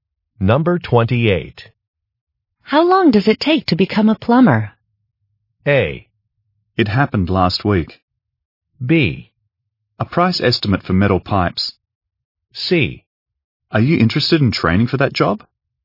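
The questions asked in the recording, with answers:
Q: How long does it take to become a plumber?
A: C: Are you interested in training for that job?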